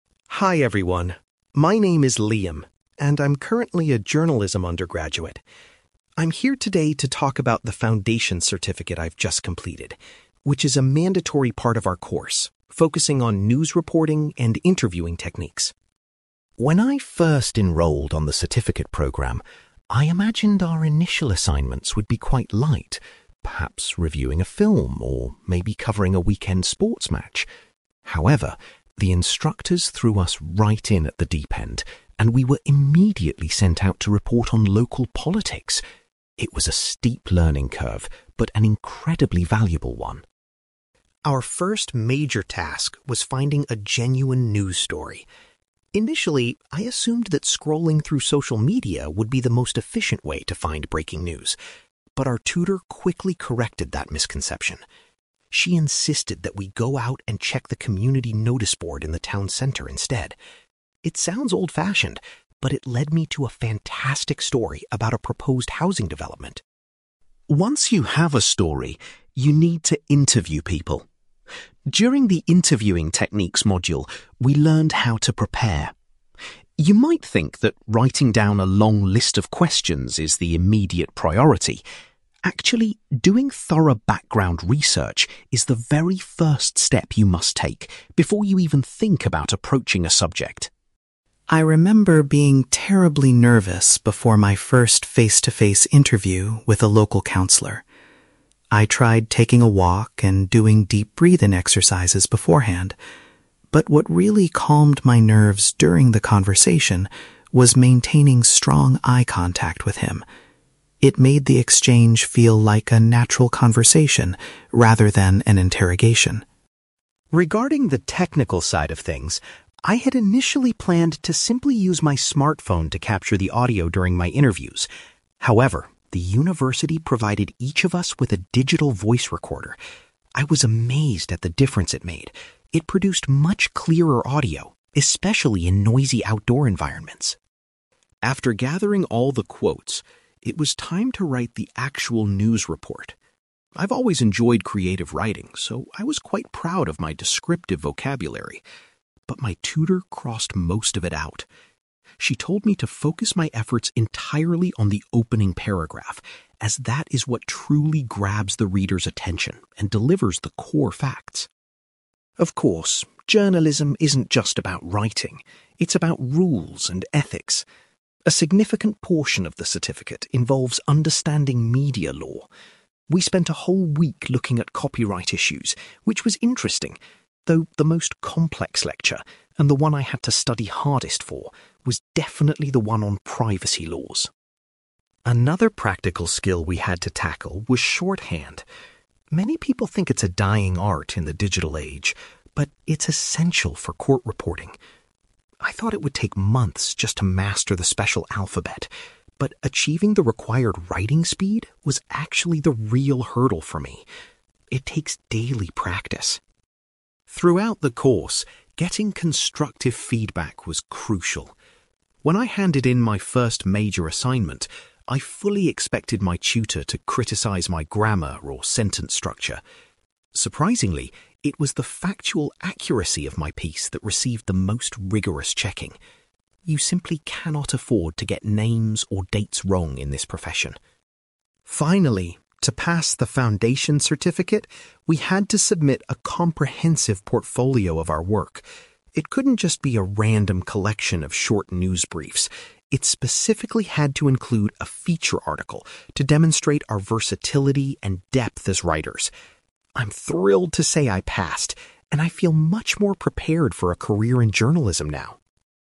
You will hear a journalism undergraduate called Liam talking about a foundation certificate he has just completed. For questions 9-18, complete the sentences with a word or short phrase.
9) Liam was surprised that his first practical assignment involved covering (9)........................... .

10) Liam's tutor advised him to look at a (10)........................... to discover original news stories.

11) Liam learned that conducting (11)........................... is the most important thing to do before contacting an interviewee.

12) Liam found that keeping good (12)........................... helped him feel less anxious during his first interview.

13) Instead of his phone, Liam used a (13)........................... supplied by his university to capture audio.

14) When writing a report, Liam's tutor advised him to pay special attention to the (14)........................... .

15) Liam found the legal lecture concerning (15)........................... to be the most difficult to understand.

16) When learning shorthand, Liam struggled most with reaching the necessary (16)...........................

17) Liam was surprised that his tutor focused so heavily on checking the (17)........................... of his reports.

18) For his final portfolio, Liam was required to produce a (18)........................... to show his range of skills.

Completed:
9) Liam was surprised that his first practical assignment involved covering local politics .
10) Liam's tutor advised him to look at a community noticeboard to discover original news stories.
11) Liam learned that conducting background research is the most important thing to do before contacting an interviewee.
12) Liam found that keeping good eye contact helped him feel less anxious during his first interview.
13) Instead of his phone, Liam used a voice recorder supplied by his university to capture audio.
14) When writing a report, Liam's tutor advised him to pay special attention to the opening paragraph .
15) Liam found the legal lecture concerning privacy laws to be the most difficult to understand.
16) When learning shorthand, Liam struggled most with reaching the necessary writing speed
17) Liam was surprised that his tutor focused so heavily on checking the factual accuracy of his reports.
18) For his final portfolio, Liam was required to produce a feature article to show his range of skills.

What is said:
Liam: Hi everyone. My name is Liam, and I'm currently a journalism undergraduate. I'm here today to talk about the foundation certificate I've just completed, which is a mandatory part of our course focusing on news reporting and interviewing techniques.
When I first enrolled on the certificate programme, I imagined our initial assignments would be quite light—perhaps reviewing a film, or maybe covering a weekend sports match. However, the instructors threw us right in at the deep end, and we were immediately sent out to report on local politics. It was a steep learning curve but an incredibly valuable one.
Our first major task was finding a genuine news story. Initially, I assumed that scrolling through social media would be the most efficient way to find breaking news. But our tutor quickly corrected that misconception. She insisted that we go out and check the community noticeboard in the town centre instead. It sounds old-fashioned, but it led me to a fantastic story about a proposed housing development.
Once you have a story, you need to interview people. During the interviewing techniques module, we learned how to prepare. You might think that writing down a long list of questions is the immediate priority. Actually, doing thorough background research is the very first step you must take before you even think about approaching a subject.
I remember being terribly nervous before my first face-to-face interview with a local councillor. I tried taking a walk and doing deep breathing exercises beforehand, but what really calmed my nerves during the conversation was maintaining strong eye contact with him. It made the exchange feel like a natural conversation rather than an interrogation.
Regarding the technical side of things, I had initially planned to simply use my smartphone to capture the audio during my interviews. However, the university provided each of us with a digital voice recorder. I was amazed at the difference it made; it produced much clearer audio, especially in noisy outdoor environments.
After gathering all the quotes, it was time to write the actual news report. I've always enjoyed creative writing, so I was quite proud of my descriptive vocabulary. But my tutor crossed most of it out! She told me to focus my efforts entirely on the opening paragraph, as that is what truly grabs the reader's attention and delivers the core facts.
Of course, journalism isn't just about writing; it's about rules and ethics. A significant portion of the certificate involves understanding media law. We spent a whole week looking at copyright issues, which was interesting, though the most complex lecture, and the one I had to study hardest for, was definitely the one on privacy laws.
Another practical skill we had to tackle was shorthand. Many people think it's a dying art in the digital age, but it's essential for court reporting. I thought it would take months just to master the special alphabet, but achieving the required writing speed was actually the real hurdle for me. It takes daily practice!
Throughout the course, getting constructive feedback was crucial. When I handed in my first major assignment, I fully expected my tutor to criticize my grammar or sentence structure. Surprisingly, it was the factual accuracy of my piece that received the most rigorous checking. You simply cannot afford to get names or dates wrong in this profession.
Finally, to pass the foundation certificate, we had to submit a comprehensive portfolio of our work. It couldn't just be a random collection of short news briefs; it specifically had to include a feature article to demonstrate our versatility and depth as writers. I'm thrilled to say I passed, and I feel much more prepared for a career in journalism now.

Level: B2